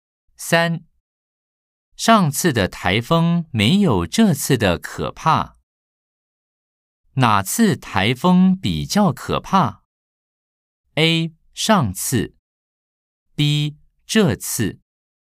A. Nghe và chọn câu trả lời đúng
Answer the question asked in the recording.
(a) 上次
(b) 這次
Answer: (b) 這次

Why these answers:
上次的颱風沒有這次的可怕。